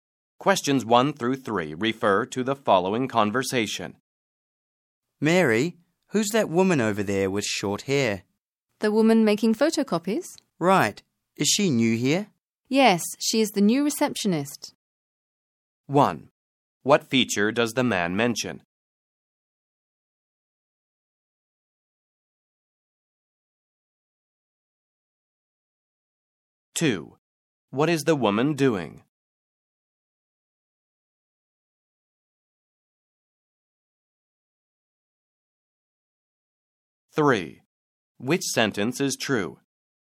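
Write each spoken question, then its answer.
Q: What feature does the man mention?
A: Her short hair

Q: What is the woman doing?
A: Making photocopies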